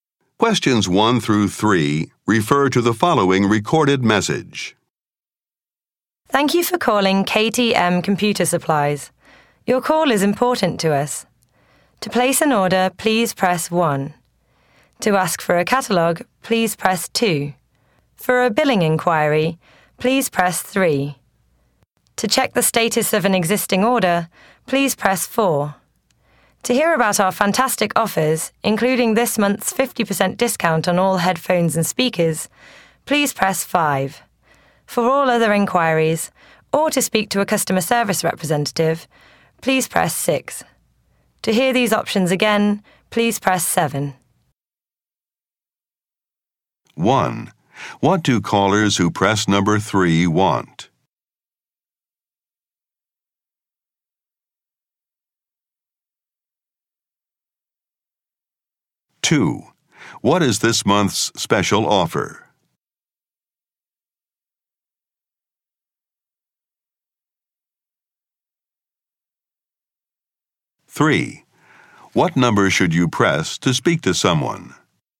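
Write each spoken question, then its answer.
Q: What do callers who press number 3 want?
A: To make a billing inquiry

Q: What is this month's special offer?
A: 50% discount on all headphones and speakers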